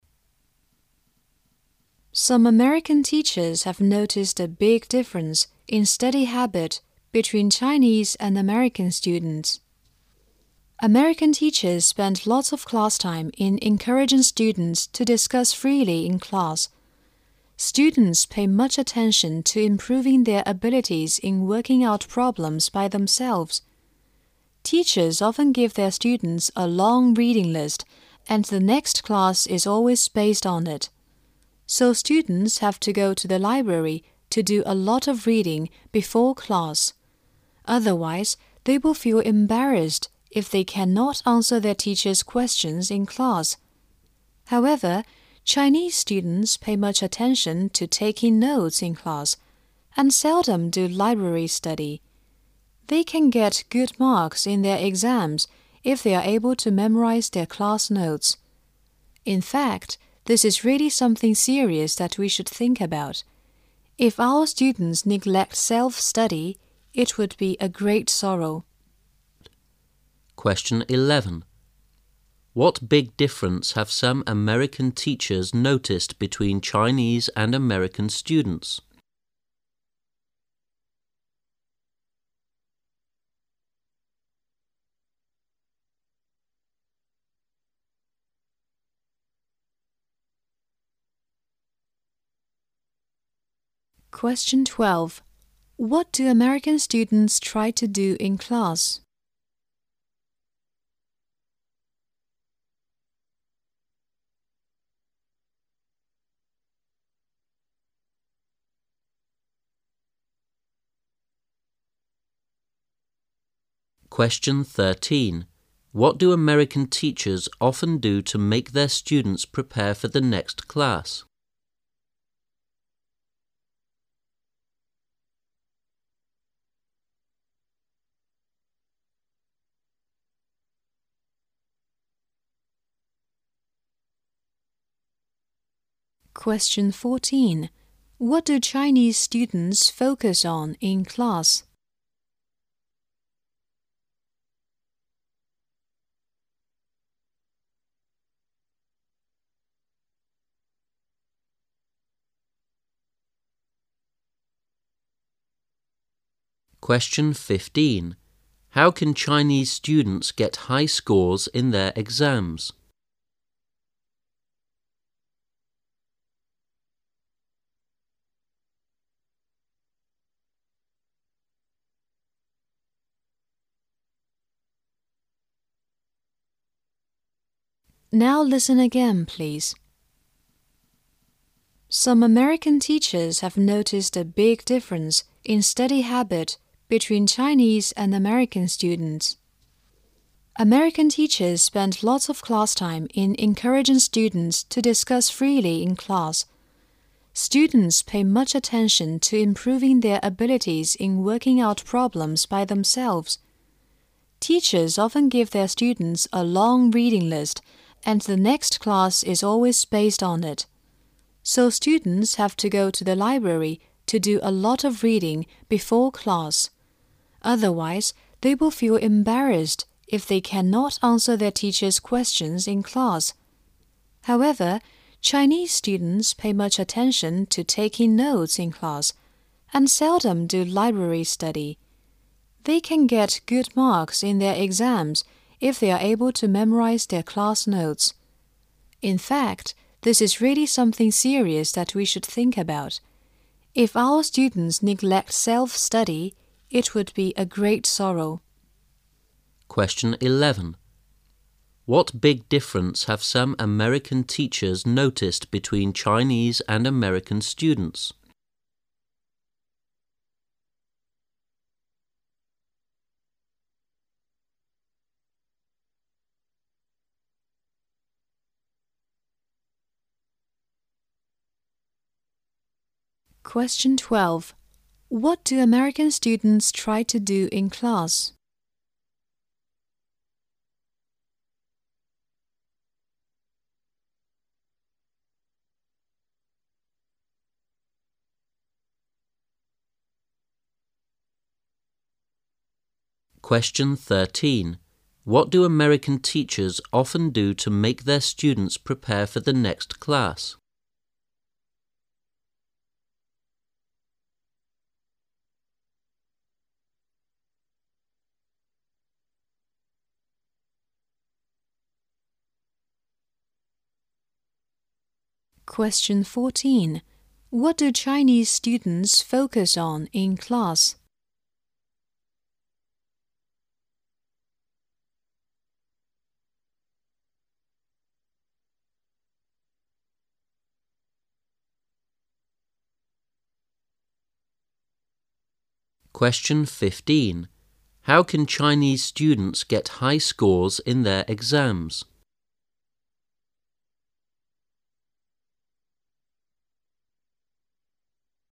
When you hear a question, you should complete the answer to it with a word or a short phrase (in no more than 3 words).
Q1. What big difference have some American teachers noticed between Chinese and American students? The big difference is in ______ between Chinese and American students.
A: study habit

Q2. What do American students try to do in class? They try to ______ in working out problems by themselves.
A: improve their abilities

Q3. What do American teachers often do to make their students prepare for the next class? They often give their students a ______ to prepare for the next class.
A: long reading list

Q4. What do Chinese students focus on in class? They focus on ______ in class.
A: taking notes

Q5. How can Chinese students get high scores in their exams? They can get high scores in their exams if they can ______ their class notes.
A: memorize

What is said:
[解析] 11-15 Some American teachers have noticed a big difference in study habit between Chinese and American students. American teachers spend lots of class time in encouraging students to discuss freely in class. Students pay much attention to improving their abilities in working out problems by themselves. Teachers often give their students a long reading list and the next class is always based on it. So students have to go to the library to do a lot of reading before class. Otherwise, they will feel embarrassed if they cannot answer their teacher's questions in class. However, Chinese students pay much attention to taking notes in class and seldom do library study. They can get good marks in their exams if they are able to memorize their class notes. In fact, this is really something serious that we should think about. If our students neglect self-study, it would be a great sorrow. 11. What big difference have some American teachers noticed between Chinese and American students?
[解析] What do American students try to do in class?
[解析] What do American teachers often do to make their students prepare for the next class?
taking notes
[解析] What do Chinese students focus on in class?
[解析] How can Chinese students get high scroes in their exams?